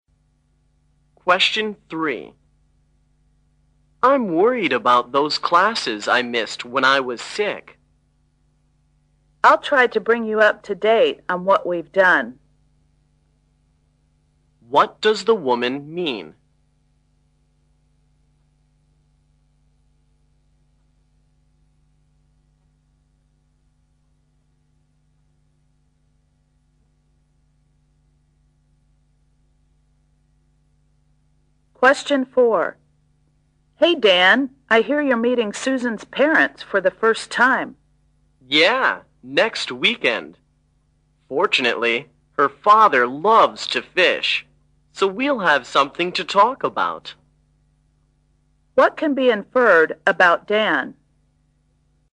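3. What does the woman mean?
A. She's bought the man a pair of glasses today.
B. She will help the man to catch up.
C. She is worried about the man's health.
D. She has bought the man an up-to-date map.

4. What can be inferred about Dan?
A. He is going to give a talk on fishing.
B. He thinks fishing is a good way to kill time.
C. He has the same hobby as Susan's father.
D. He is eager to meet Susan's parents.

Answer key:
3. B
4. C

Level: 大学英语四级

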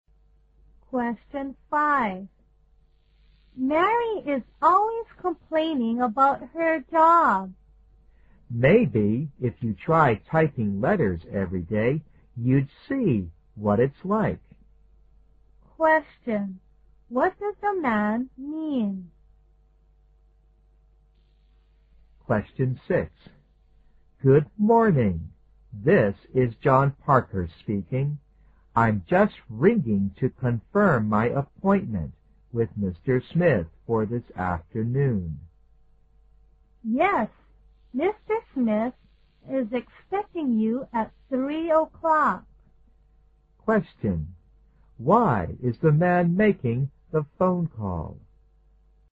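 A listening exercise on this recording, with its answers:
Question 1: What does the man mean?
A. The woman isn't a skillful typist.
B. The woman should work as hard as Mary.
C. The woman should do the typing for Mary.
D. The woman would understand if she did Mary's job.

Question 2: Why is the man making the phone call?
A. He wants to change the time of the appointment.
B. He wants the woman to meet him at three o'clock.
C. He wants to make an appointment with Mr. Smith.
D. He wants to make sure that Mr. Smith will see him.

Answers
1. D
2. D

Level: 大学英语四级

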